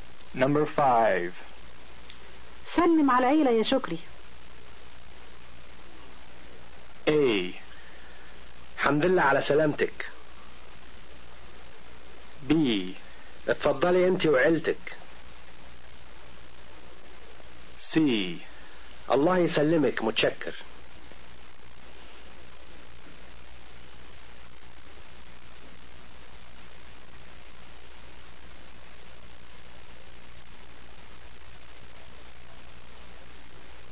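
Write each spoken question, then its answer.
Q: سلم على العيلة يا شكري.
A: C: الله يسلمك متشكر.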